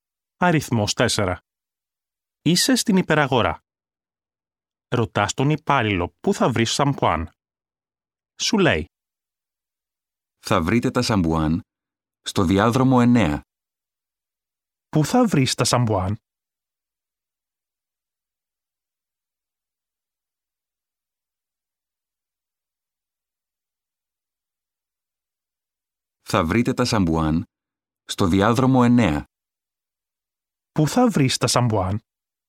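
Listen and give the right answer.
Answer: Στο διάδρομο 9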